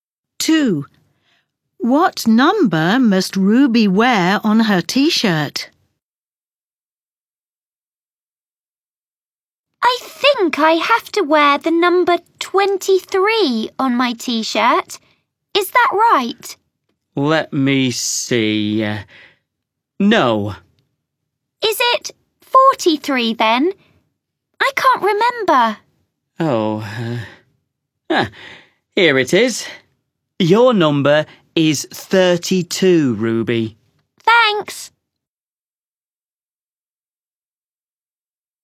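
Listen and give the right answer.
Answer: 32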